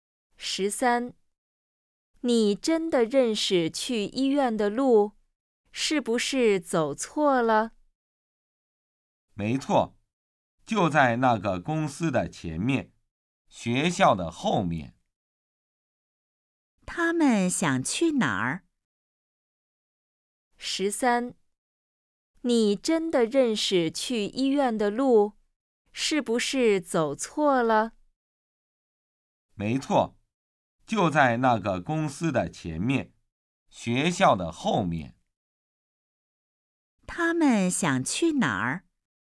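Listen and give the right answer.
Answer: 医院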